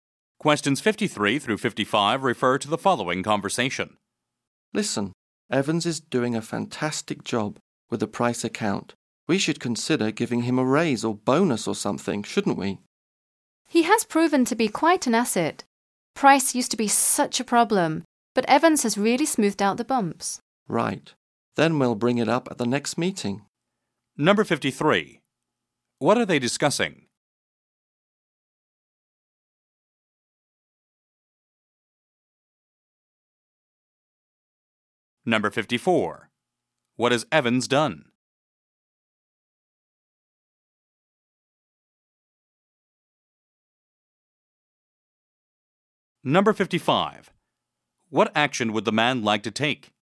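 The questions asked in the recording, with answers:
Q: What are they discussing?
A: Evans's work performance

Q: What has Evans done?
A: He has done a fantastic job on the Price account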